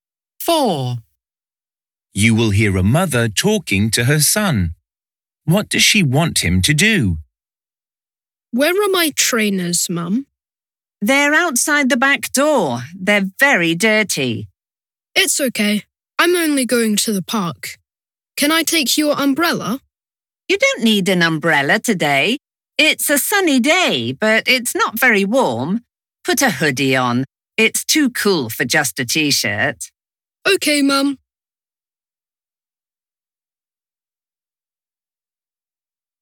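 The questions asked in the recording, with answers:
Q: What does she want him to do?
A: Put a hoodie on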